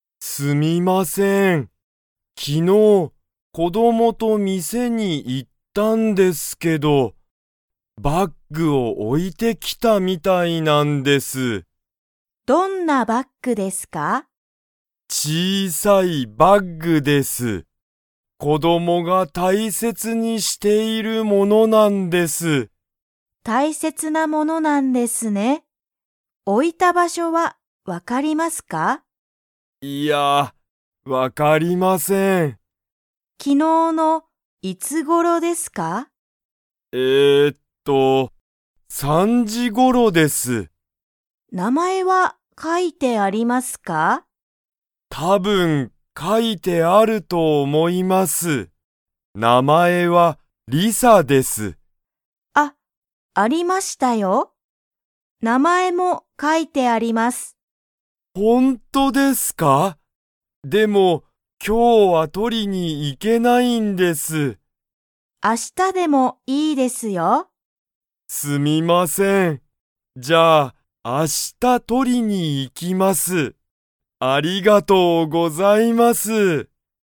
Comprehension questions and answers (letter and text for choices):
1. この子供(こども)は何(なに)を店(みせ)に置(お)いて来(き)ましたか?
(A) 友達(ともだち)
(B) バッグ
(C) お金(かね)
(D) スマホ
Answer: (B) バッグ

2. それには、名前(なまえ)が書かいて____。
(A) ある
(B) ない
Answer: (A) ある